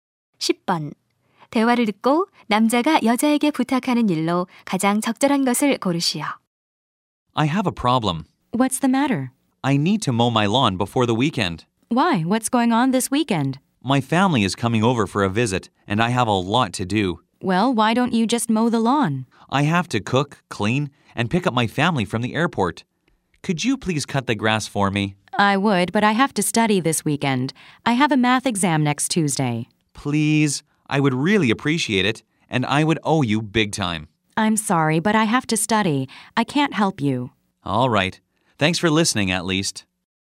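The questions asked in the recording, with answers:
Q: 대화를 듣고 남자가 여자에게 부탁하는 일로 가장 적절한 것을 고르시오.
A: 잔디 깎기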